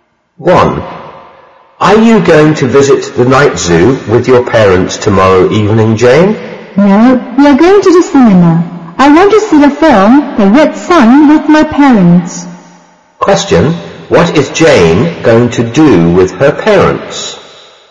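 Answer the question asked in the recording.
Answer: See the film The Red Sun at the cinema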